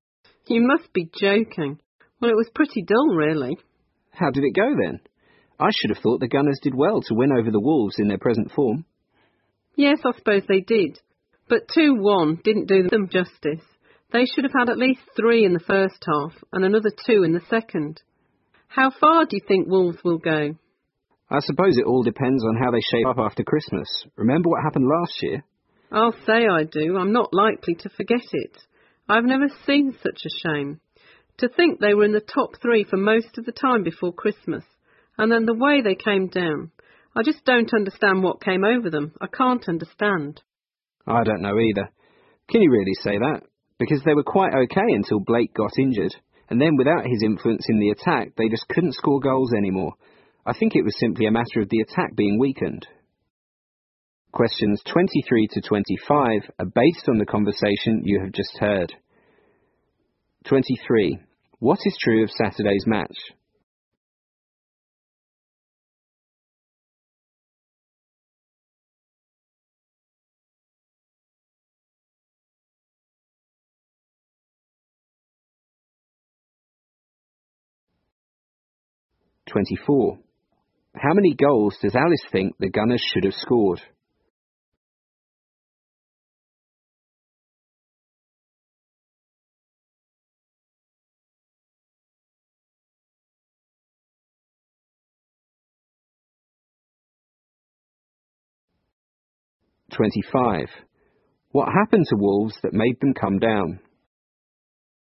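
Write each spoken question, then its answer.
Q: How many goals does Alice think the Gunners should have scored?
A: At least 5

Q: What happened to Wolves that made them come down?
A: Blake got injured, which weakened their attack.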